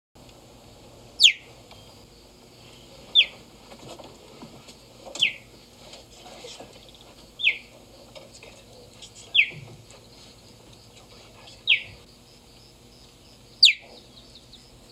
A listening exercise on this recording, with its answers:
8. Which animal chirps like this?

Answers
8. Cheetah!

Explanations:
Were you surprised to learn a cat could sound like a bird? Nature can be tricky like that! Cheetahs cannot roar like other big cats. Cheetahs purr, growl, hiss and chirp. The chirp sound is used by both males and females to communicate a variety of emotions or a mother cheetah will use the chirp as a call to her cubs.